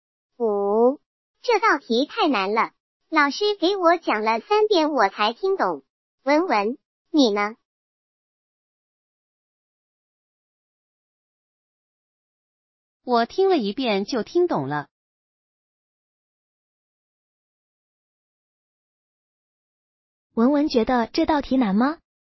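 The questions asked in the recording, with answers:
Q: 文文觉得这道题难吗?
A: 不难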